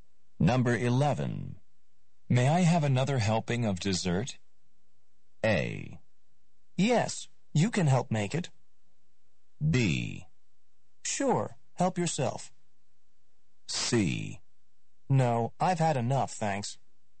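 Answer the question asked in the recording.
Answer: B: Sure, help yourself.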